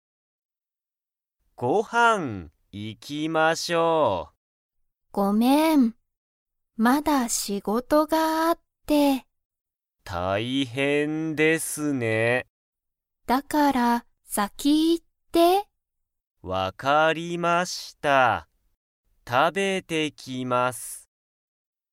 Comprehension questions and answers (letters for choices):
Comprehension Quiz (Skip if you don't understand the conversation yet)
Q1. 宮本(みやもと)さんは____仕事(しごと)がある。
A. 今度こんど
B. あとで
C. よく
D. まだ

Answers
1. D

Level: Level 1